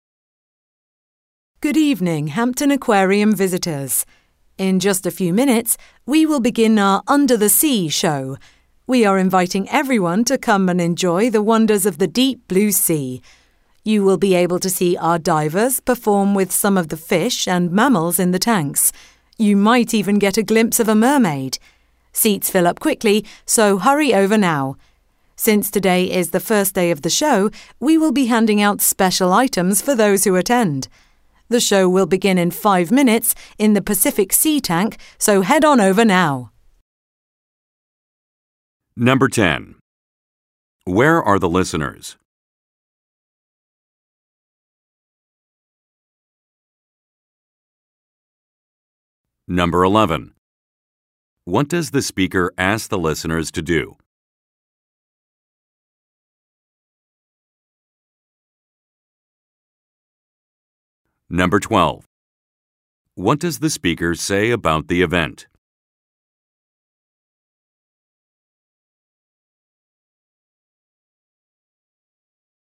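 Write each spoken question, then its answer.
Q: Where are the listeners?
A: At an aquarium (Hampton Aquarium)

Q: What does the speaker ask the listeners to do?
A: Hurry over to the show to get seats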